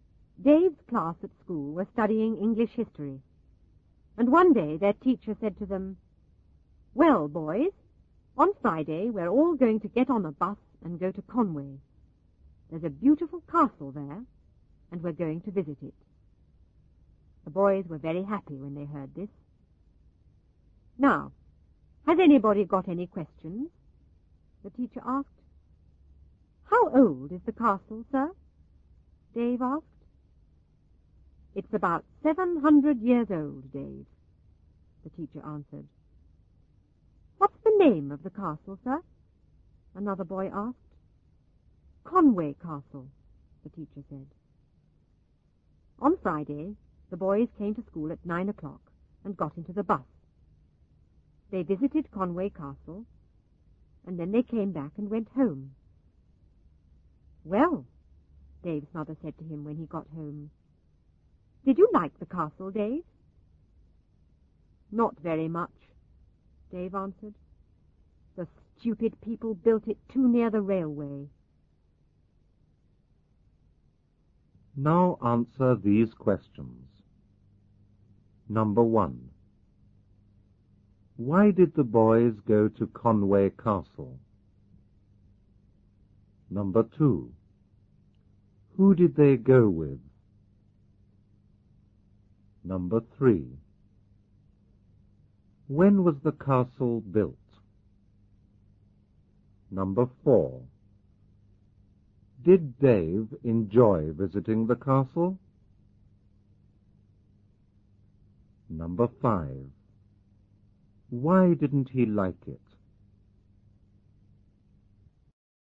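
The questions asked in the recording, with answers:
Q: Why did the boys go to Conway Castle?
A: They were studying English history, and their teacher took them to visit the castle

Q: Who did they go with?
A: Their teacher and classmates

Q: When was the castle built?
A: About 700 years ago

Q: Did Dave enjoy visiting the castle?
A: No, not very much

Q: Why didn't he like it?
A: He thought it was built too near the railway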